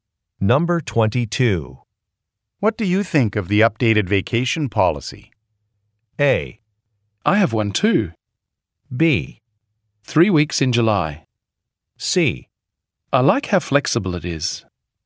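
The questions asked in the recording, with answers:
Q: What do you think of the updated vacation policy?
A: C: I like how flexible it is.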